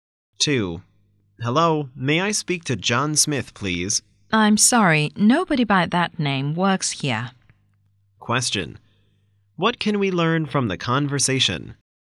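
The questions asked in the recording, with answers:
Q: What can we learn from the conversation?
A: John Smith doesn't work there; the caller has the wrong number.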